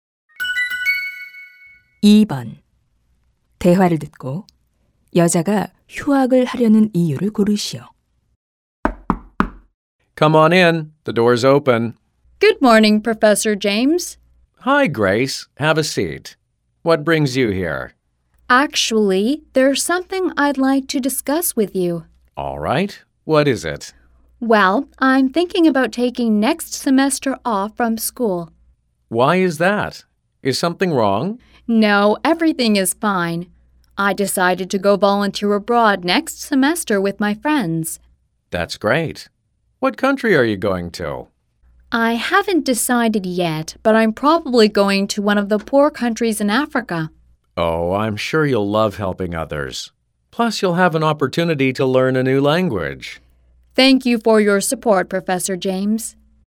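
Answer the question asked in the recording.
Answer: 해외 봉사활동을 가려고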